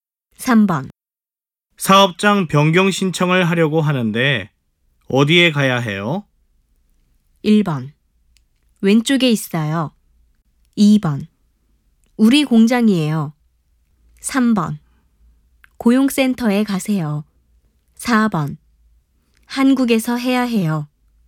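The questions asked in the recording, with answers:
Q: 사업장 변경 신청을 하려고 하는데 어디에 가야 해요?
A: 3: 고용센터에 가세요.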